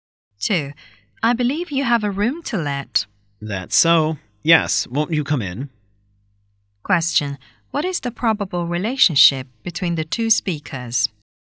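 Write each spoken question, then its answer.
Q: What is the probable relationship between the two speakers?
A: Landlord and prospective tenant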